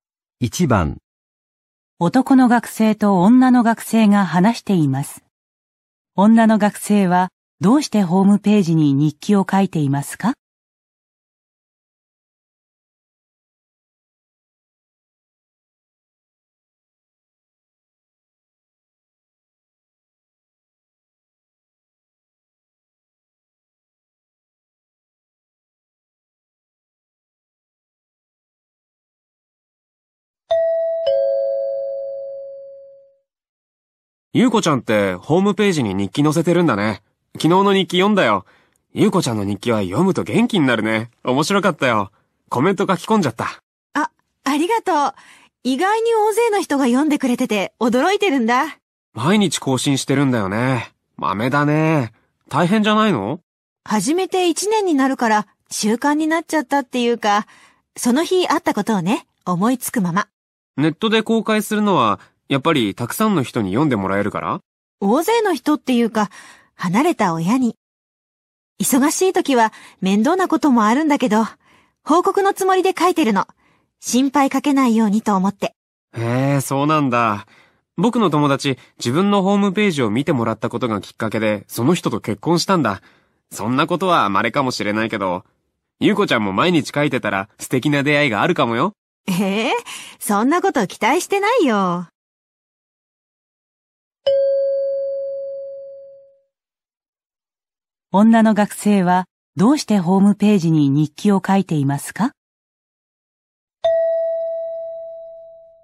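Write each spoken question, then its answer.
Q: 女の学生はどうしてホームページに日記を書いていますか?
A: 離れて暮らす親に近況を報告するため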